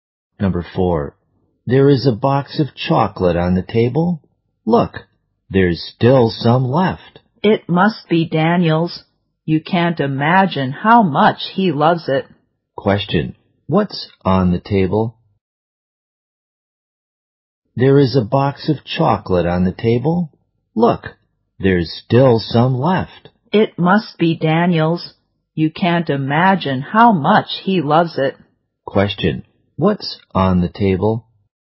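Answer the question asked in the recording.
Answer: A box of chocolate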